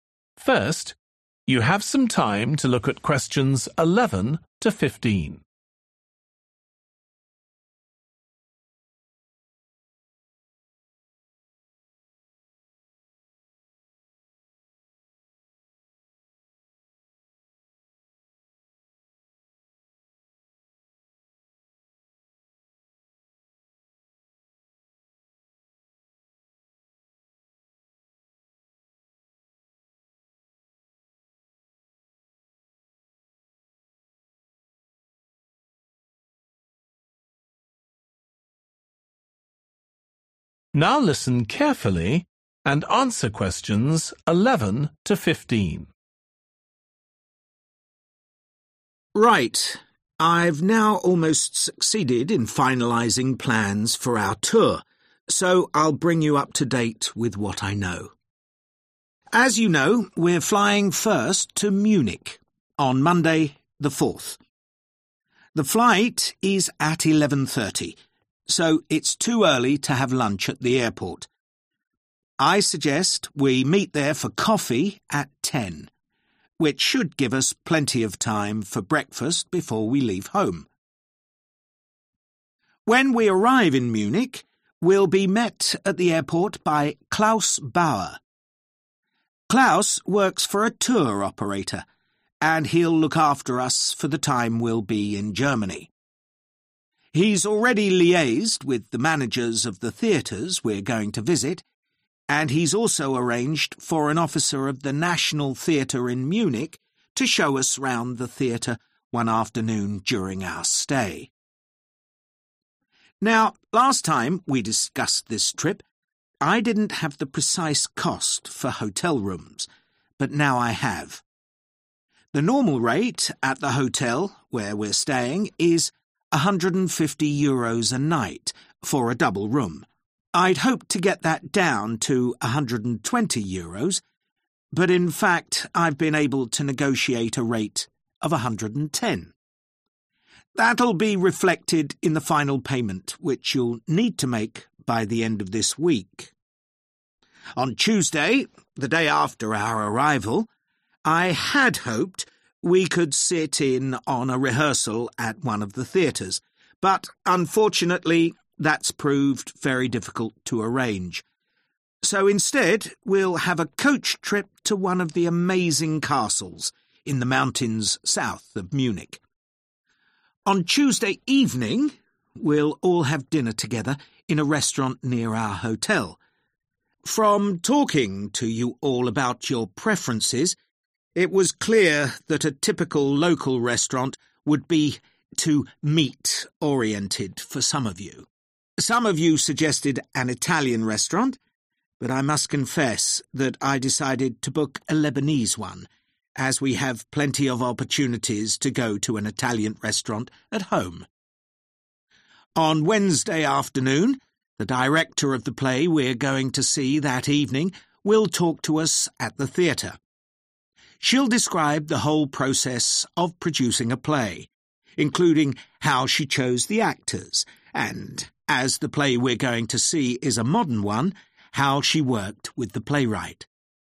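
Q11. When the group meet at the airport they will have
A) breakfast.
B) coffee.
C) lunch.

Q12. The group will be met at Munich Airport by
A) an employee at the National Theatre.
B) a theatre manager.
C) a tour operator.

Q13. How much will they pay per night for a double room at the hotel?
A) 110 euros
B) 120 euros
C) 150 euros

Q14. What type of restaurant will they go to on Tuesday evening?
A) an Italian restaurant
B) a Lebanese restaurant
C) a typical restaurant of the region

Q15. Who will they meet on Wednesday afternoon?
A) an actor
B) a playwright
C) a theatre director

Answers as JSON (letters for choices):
{"11": "B", "12": "C", "13": "A", "14": "B", "15": "C"}

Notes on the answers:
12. When we arrive in Munich, we'll be met at the airport by Claus Bauer. Claus works for a tour operator(Khi chúng tôi đến Munich, chúng tôi sẽ được đón tại sân bay bởi Claus Bauer. Claus làm việc cho một công ty tour du lịch), and he'll look after us for the time we'll be in Germany.
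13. The normal rate at the hotel where we're staying is 150 euros a night for a double room. I'd hoped to get that down to 120 euros, but in fact I've been able to negotiate a rate of 110. (Mức giá thông thường tại khách sạn nơi chúng tôi đang ở là 150 euro một đêm cho phòng đôi. Tôi hy vọng giảm số tiền đó xuống còn 120 euro, nhưng trên thực tế, tôi đã có thể thương lượng mức giá 110)
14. Some of you suggested an Italian restaurant, but I must confess that I decided to book a Lebanese one (Một số bạn đã đề xuất một nhà hàng Ý, nhưng tôi phải thú nhận rằng tôi đã quyết định đặt bàn tại một nhà hàng Lebanon), as we have plenty of opportunities to go to an Italian restaurant at home.
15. On Wednesday afternoon, the director of the play we're going to see that evening will talk to us at the theater (Vào chiều thứ Tư, đạo diễn của vở kịch mà chúng ta sẽ xem vào tối hôm đó sẽ trò chuyện với chúng ta tại nhà hát)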